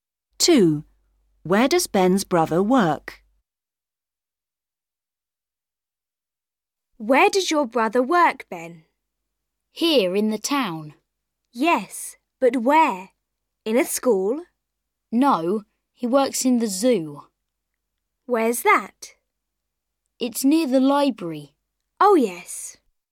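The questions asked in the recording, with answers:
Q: Where does Ben's brother work?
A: in the zoo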